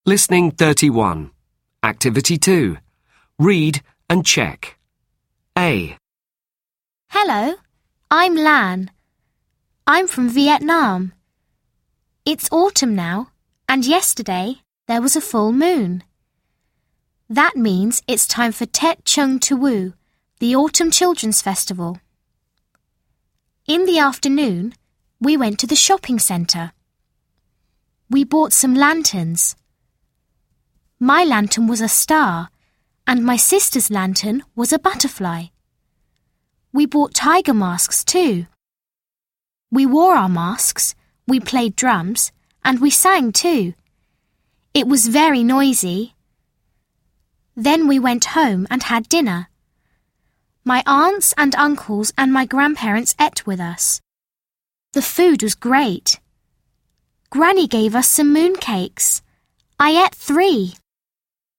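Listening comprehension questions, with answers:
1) Where's Lan from?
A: She's from Vietnam

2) When is the Children Festival?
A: In autumn.

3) What did she buy in the shopping centre?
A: She bought lanterns and masks.

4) How many moon cake did she eat?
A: She ate three moon cakes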